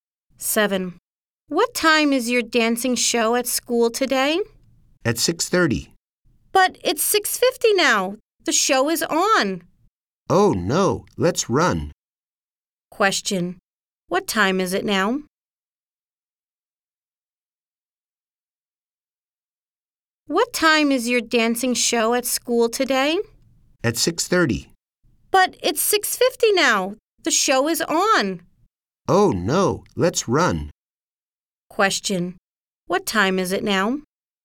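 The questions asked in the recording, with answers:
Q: What time is it now?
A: 6:50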